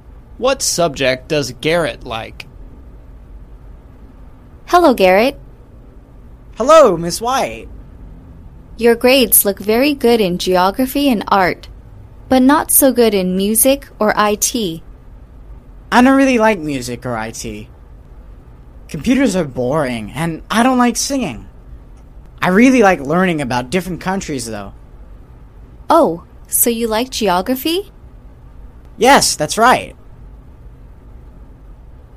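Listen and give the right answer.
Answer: geography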